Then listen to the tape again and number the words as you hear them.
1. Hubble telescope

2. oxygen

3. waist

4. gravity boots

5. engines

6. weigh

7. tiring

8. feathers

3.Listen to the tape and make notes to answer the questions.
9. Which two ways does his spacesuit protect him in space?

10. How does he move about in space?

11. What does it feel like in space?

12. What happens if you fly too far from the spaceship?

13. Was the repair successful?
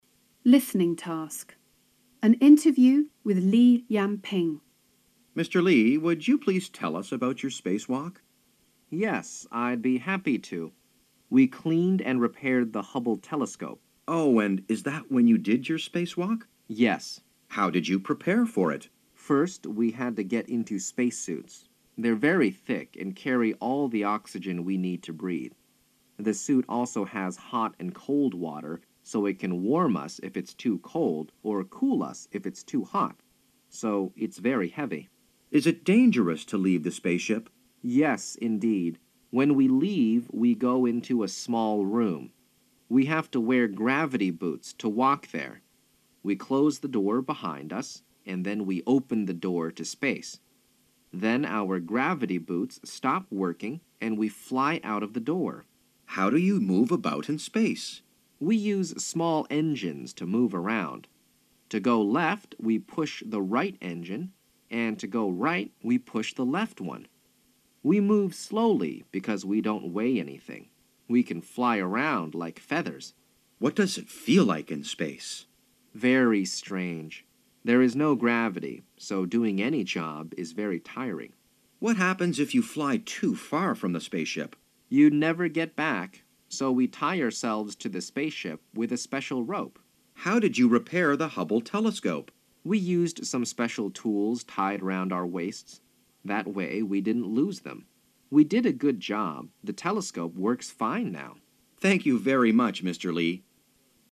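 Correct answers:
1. 1
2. 2
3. 8
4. 3
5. 4
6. 5
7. 7
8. 6
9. It carries the oxygen he needs to breathe, and it has hot and cold water to warm or cool him.
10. He uses small engines: push the right engine to go left, the left one to go right.
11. Very strange; with no gravity any job is very tiring.
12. You would never get back.
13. Yes, the telescope works fine now.

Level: 高中英语必修三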